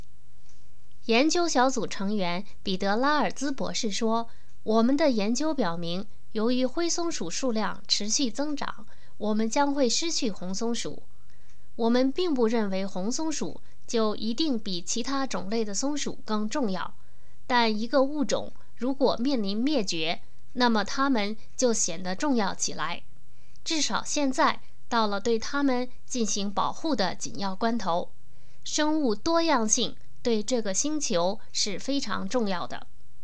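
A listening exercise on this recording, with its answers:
Please answer the following questions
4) 拉尔兹博士是否认为红松鼠比其他种类的松鼠重要?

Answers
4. 不认为红松鼠一定更重要,但一个物种面临灭绝时就显得重要起来。

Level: 3rd Year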